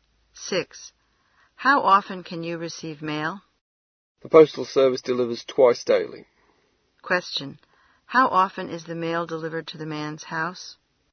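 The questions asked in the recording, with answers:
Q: How often is the mail delivered to the man's house?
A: Twice a day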